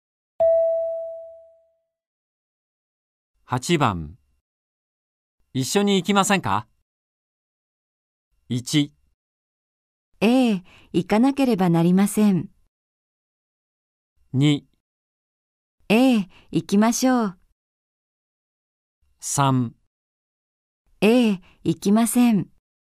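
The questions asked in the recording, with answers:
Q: 一緒に行きませんか。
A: 2: ええ、行きましょう。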